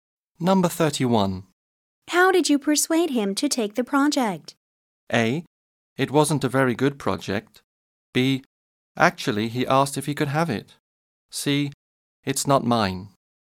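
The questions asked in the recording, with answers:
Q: How did you persuade him to take the project?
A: B: Actually, he asked if he could have it.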